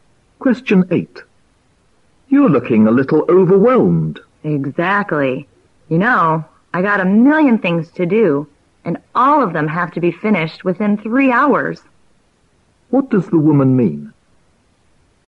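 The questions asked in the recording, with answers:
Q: What does the woman mean?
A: She has too much to do and only 3 hours to finish it.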